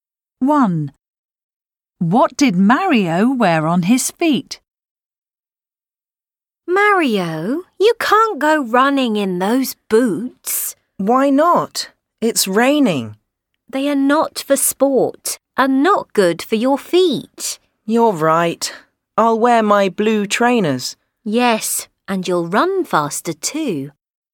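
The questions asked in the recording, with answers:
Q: What did Mario wear on his feet?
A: blue trainers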